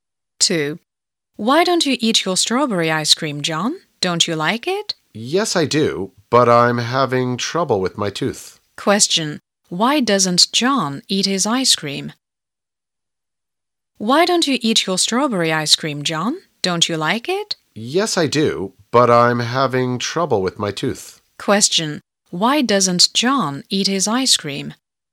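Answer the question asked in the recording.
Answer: He's having trouble with his tooth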